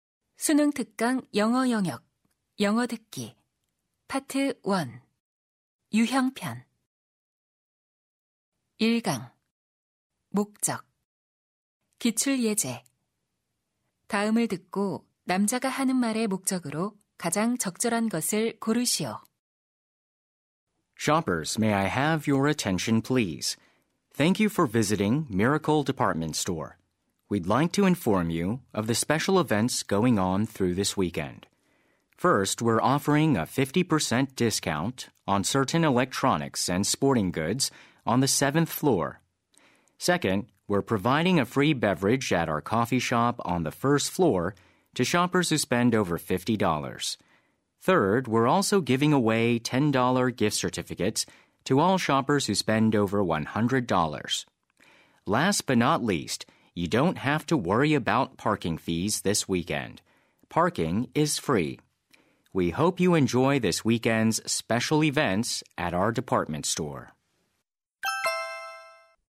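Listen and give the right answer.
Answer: 백화점 주말 특별 행사를 안내하려고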